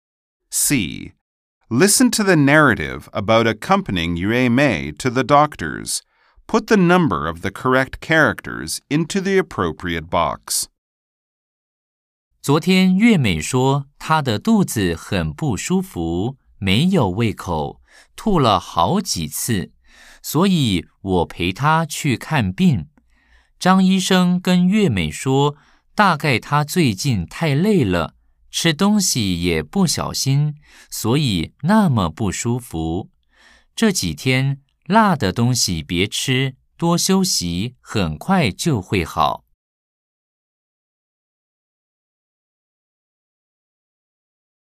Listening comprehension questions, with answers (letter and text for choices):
C. Nghe cuộc khám bệnh của Nguyệt Mỹ (月美). 🎧15-5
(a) 頭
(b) 肚子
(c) 冰的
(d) 感冒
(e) 辣的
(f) 多休息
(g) 多喝水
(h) 吃東西不小心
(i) 吃辣的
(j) 喉嚨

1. 她哪裡不舒服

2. 她什麼東西不能吃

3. 醫生說她應該多做什麼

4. 她為什麼會不舒服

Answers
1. (b) 肚子
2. (e) 辣的
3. (f) 多休息
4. (h) 吃東西不小心